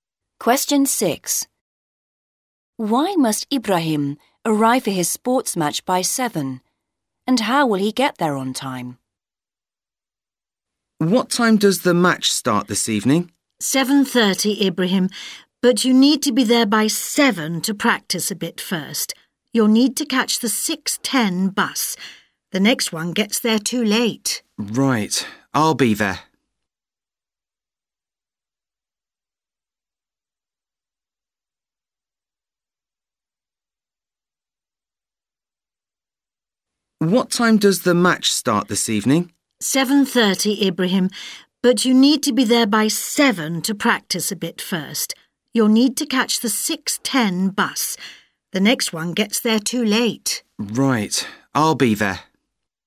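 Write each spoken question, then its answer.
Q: Why must Ibrahim arrive for his sports match by 7?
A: To practise a bit first

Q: And how will he get there on time?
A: By catching the 6:10 bus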